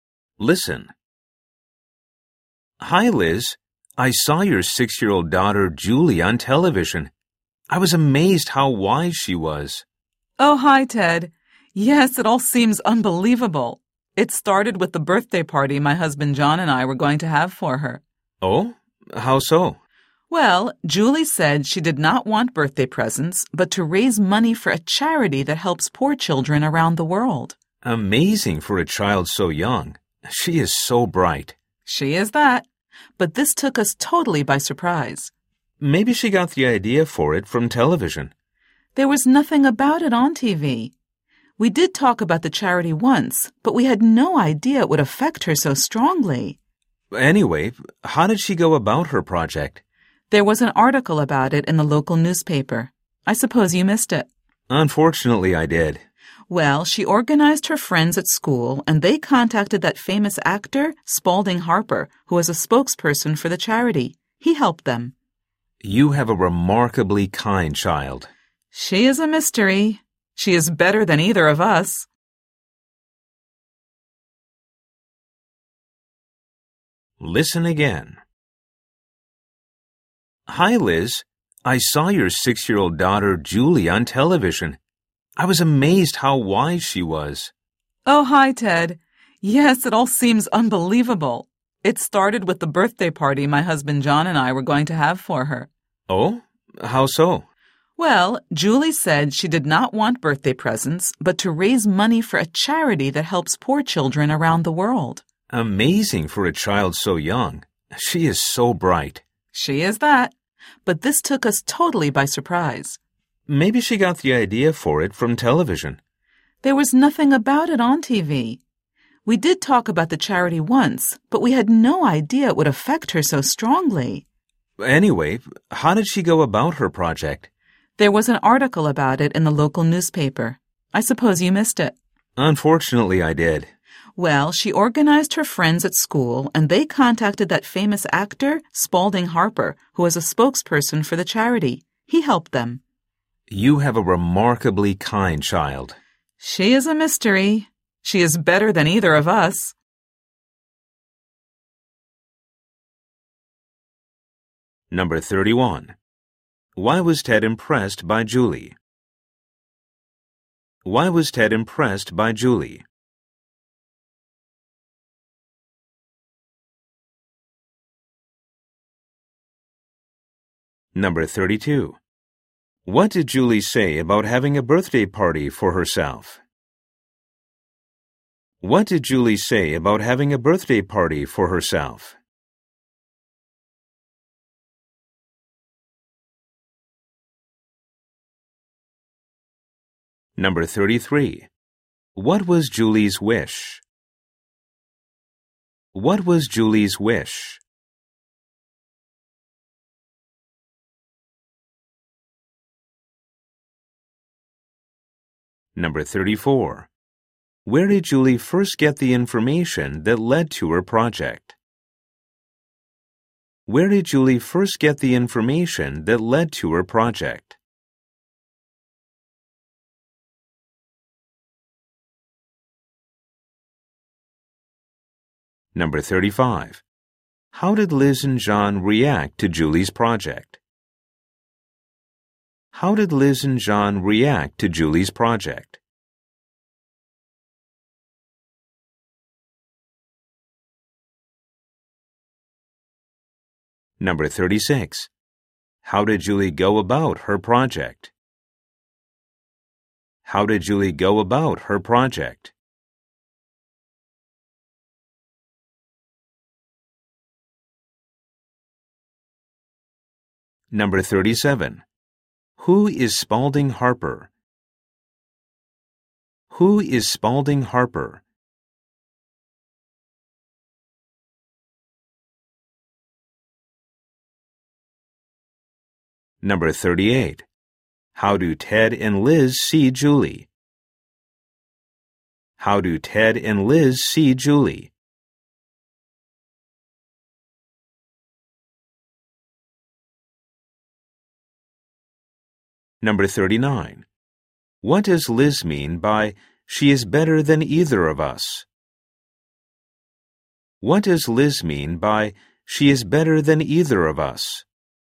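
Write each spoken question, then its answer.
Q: Why was Ted impressed by Julie?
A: She was so wise for a six-year-old

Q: What did Julie say about having a birthday party for herself?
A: She didn't want presents; she wanted to raise money for a charity instead

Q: What was Julie's wish?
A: To raise money for a charity that helps poor children around the world

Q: How did Liz and John react to Julie's project?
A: They were totally surprised

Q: How did Julie go about her project?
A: She organized her school friends and they contacted the actor Spalding Harper

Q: Who is Spalding Harper?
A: A famous actor who is a spokesperson for the charity

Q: How do Ted and Liz see Julie?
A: As a remarkably kind, bright child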